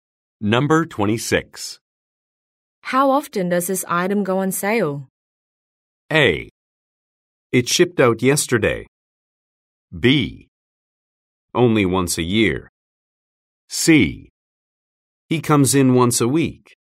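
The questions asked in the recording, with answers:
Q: How often does this item go on sale?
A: B: Only once a year.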